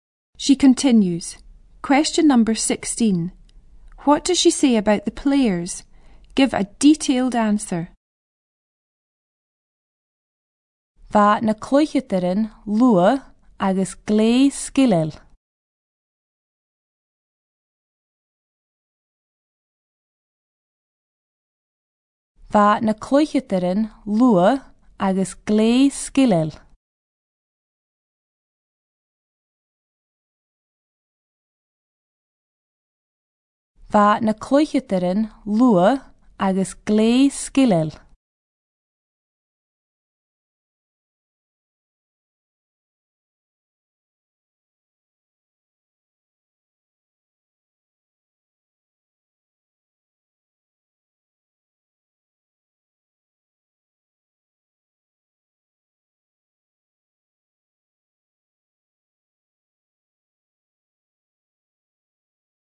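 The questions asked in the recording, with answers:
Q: What does she say about the players?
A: They were fast and very skilful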